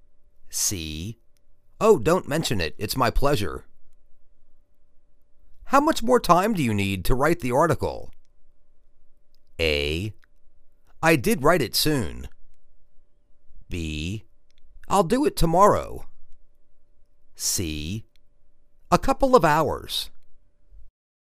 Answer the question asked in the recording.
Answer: A couple of hours.